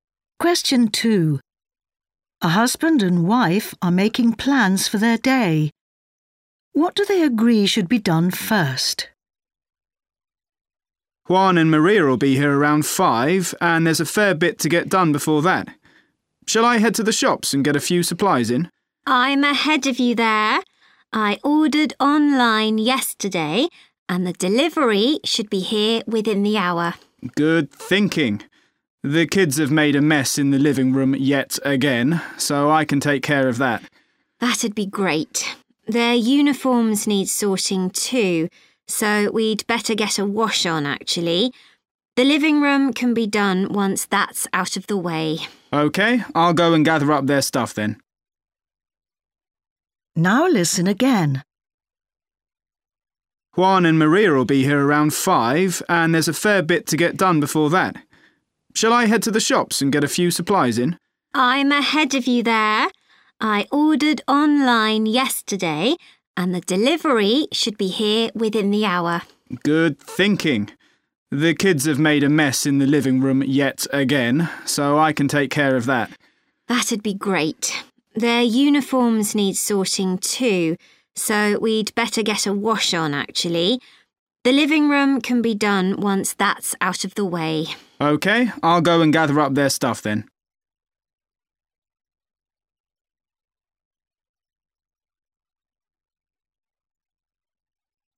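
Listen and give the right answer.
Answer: The washing (the kids' uniforms)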